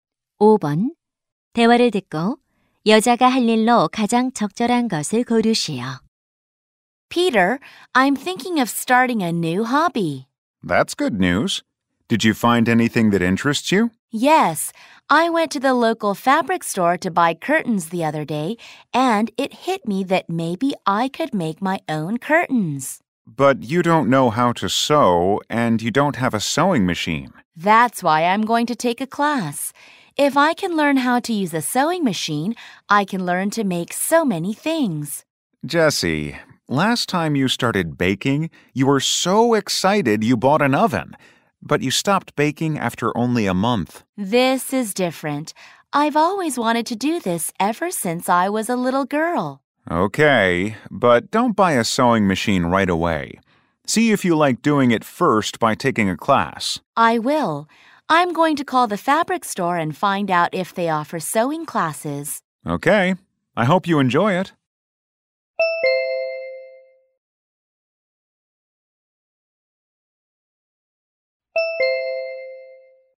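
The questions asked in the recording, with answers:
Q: 대화를 듣고 여자가 할 일로 가장 적절한 것을 고르시오.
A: 원단 가게에 전화해 바느질 수업이 있는지 알아보기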